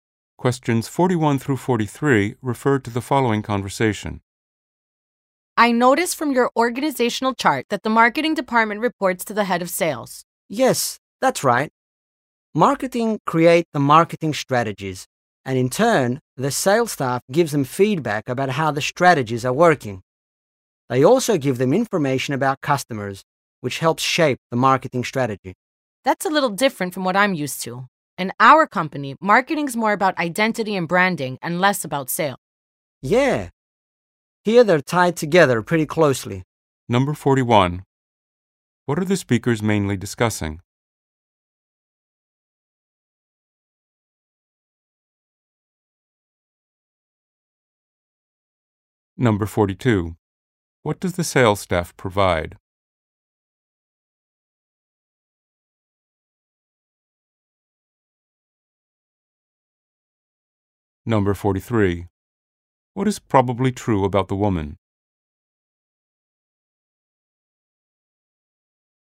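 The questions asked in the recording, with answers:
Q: What are the speakers mainly discussing?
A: How marketing and sales are organized in the company

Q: What does the sales staff provide?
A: Feedback on strategies and customer information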